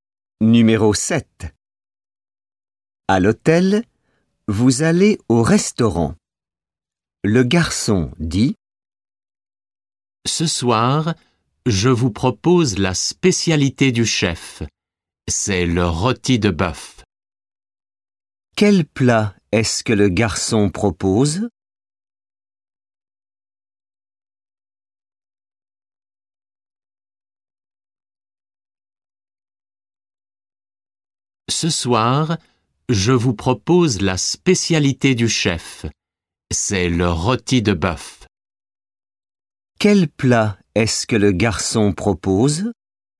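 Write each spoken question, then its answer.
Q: Quel plat est-ce que le garçon propose?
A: Le rôti de bœuf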